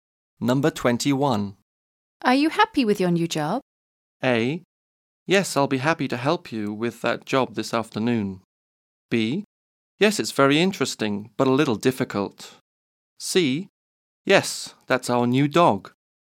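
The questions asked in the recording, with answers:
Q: Are you happy with your new job?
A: B: Yes, it's very interesting, but a little difficult.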